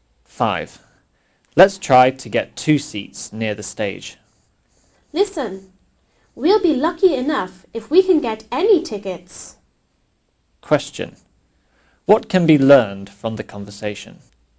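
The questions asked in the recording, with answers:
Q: What can be learned from the conversation?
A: Tickets may be hard to get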